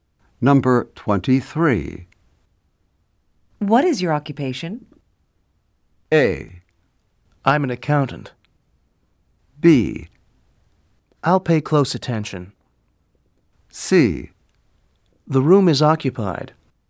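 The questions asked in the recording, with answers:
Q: What is your occupation?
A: A: I'm an accountant.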